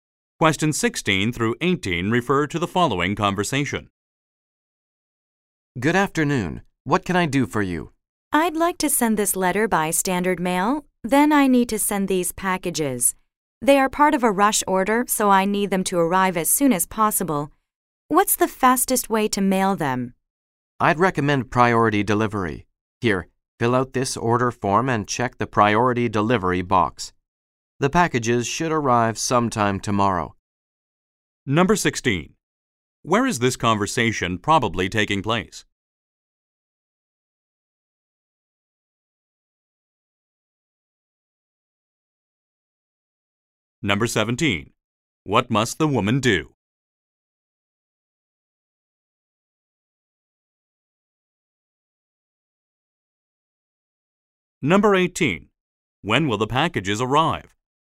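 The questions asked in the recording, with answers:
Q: Where is this conversation probably taking place?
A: At a post office

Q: What must the woman do?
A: Fill out an order form

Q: When will the packages arrive?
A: Tomorrow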